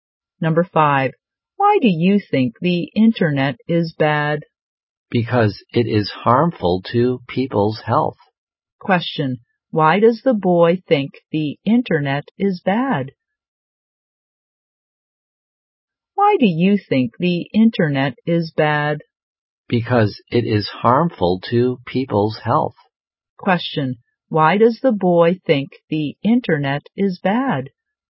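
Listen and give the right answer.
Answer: It is harmful to people's health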